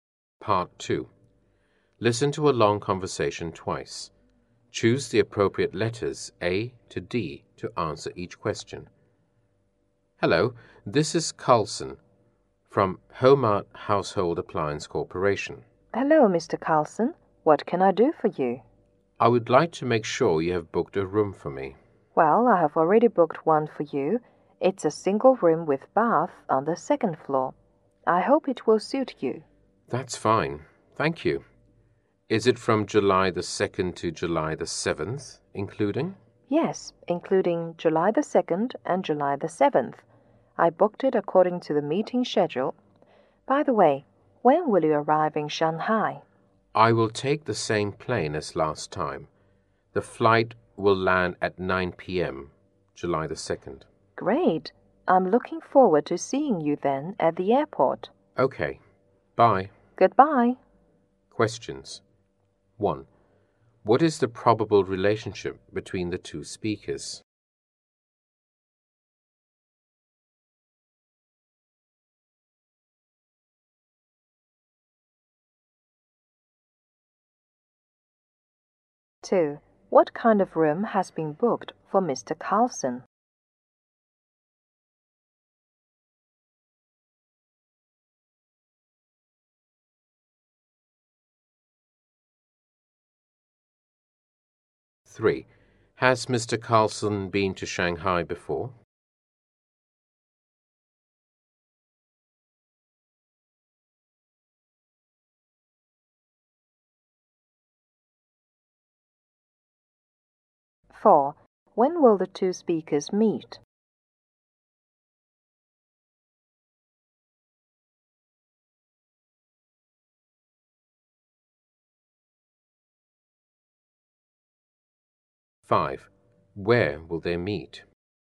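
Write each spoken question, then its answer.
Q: What kind of room has been booked for Mr. Carlson?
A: A single room with bath on the second floor

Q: Has Mr. Carlson been to Shanghai before?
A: Yes

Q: When will the two speakers meet?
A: At 9 p.m. on July 2nd

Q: Where will they meet?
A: At the airport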